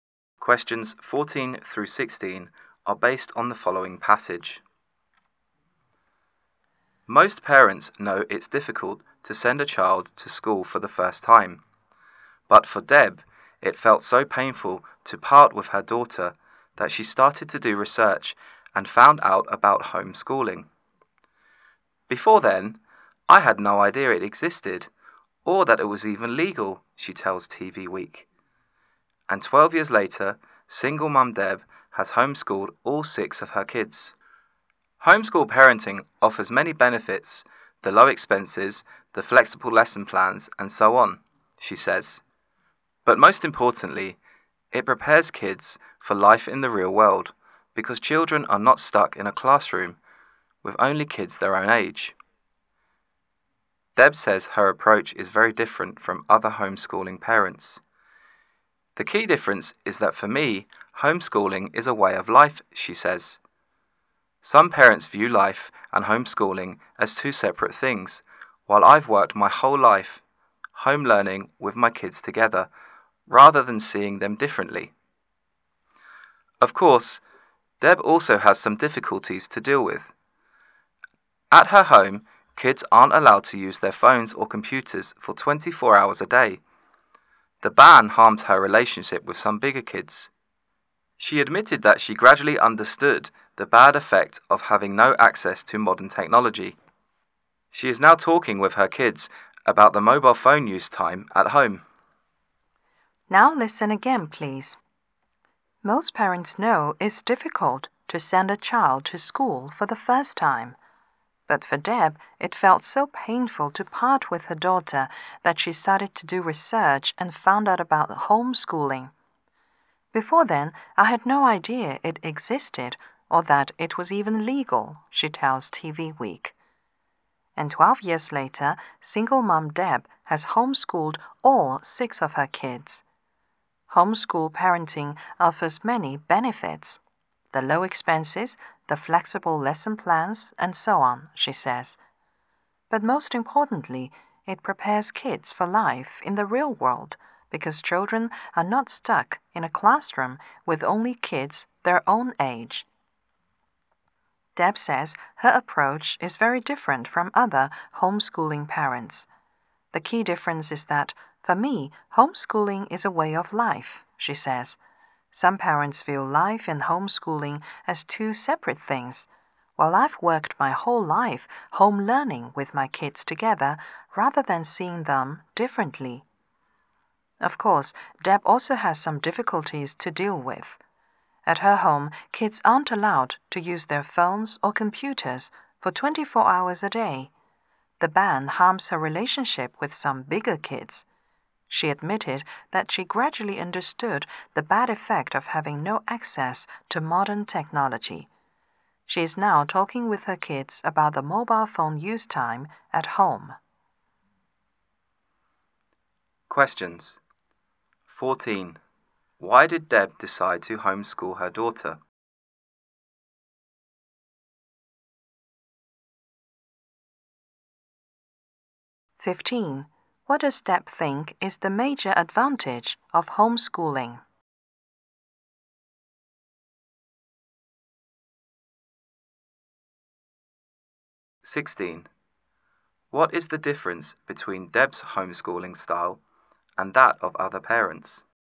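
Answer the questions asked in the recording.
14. She found it too painful to part with her daughter.
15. It prepares kids for life in the real world.
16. For her, homeschooling is a way of life rather than something separate from life.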